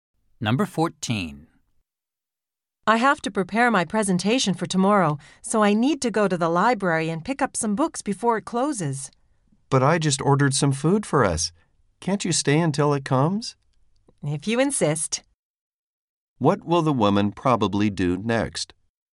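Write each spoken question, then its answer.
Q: What will the woman probably do next?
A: Stay until the food arrives.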